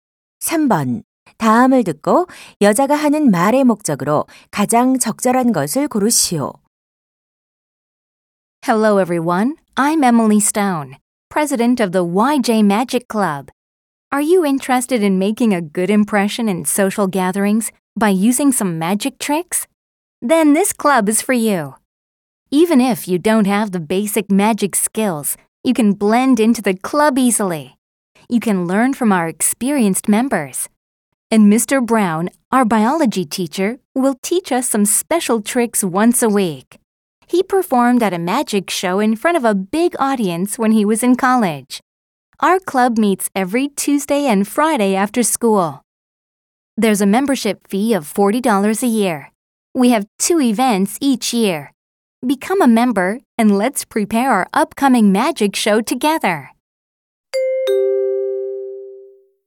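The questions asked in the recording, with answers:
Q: 다음을 듣고 여자가 하는 말의 목적으로 가장 적절한 것을 고르시오.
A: 마술 동아리 회원 모집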